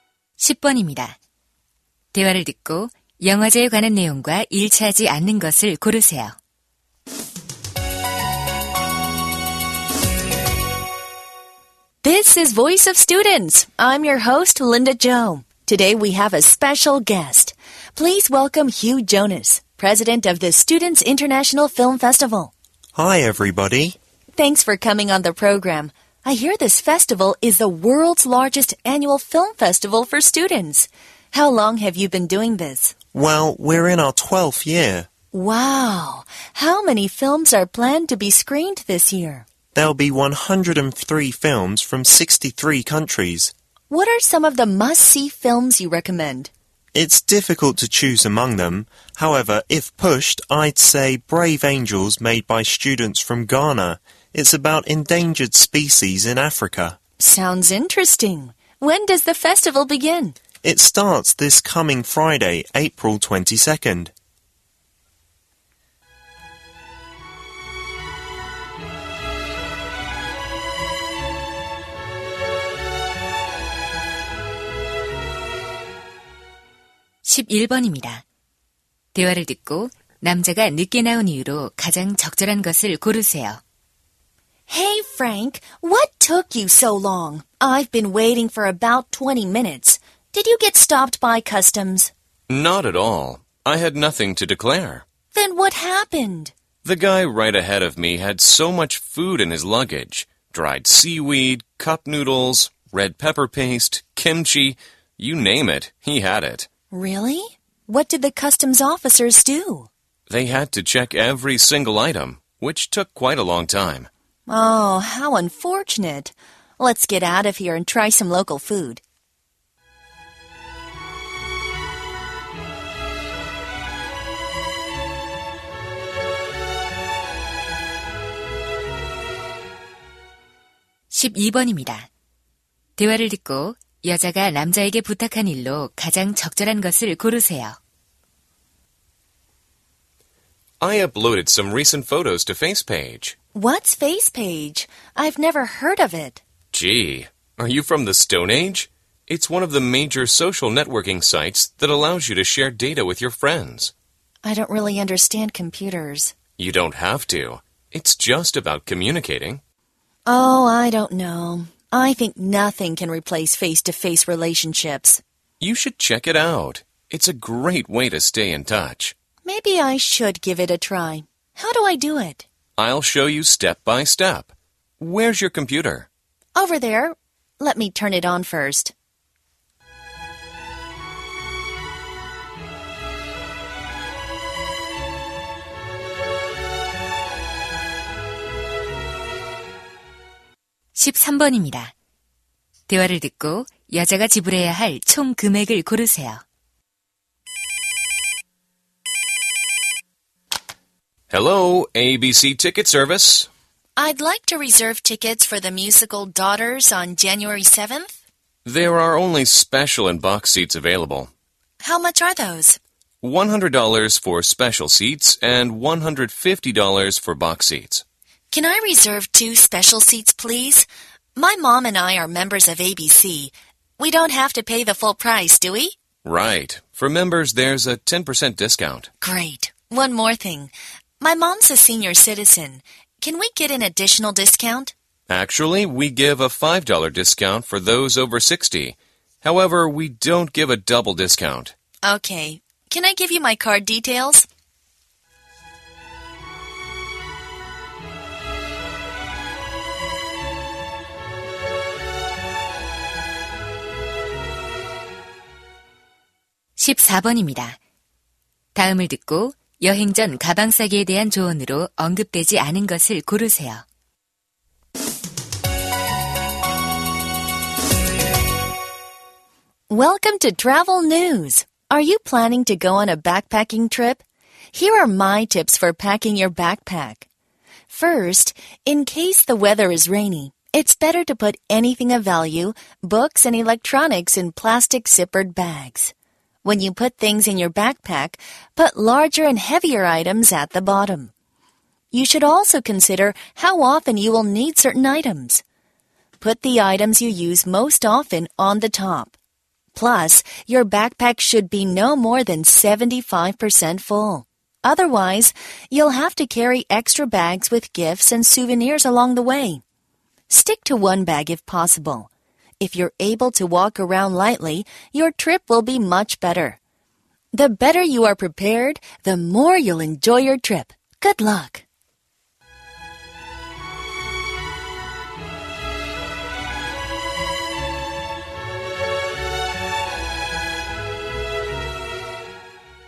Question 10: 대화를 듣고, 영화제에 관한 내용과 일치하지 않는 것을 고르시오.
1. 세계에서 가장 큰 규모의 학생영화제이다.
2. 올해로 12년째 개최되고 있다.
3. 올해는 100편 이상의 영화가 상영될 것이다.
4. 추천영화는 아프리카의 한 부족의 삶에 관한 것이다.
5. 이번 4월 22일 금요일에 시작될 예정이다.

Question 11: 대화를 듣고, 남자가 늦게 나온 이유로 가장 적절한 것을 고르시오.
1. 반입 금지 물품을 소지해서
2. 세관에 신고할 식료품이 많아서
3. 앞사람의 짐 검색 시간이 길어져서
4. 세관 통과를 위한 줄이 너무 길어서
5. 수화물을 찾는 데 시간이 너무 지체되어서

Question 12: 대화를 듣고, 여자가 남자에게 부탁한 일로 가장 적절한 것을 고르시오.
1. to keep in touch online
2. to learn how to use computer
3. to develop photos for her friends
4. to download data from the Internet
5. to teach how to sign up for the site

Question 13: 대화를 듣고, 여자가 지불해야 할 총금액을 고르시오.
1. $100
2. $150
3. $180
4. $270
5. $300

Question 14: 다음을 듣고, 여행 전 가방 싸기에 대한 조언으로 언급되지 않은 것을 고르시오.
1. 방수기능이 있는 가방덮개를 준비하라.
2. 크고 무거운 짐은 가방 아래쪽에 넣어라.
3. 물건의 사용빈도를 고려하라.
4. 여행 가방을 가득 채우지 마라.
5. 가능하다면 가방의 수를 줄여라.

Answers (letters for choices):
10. 4
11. 3
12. 5
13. 3
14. 1

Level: 고2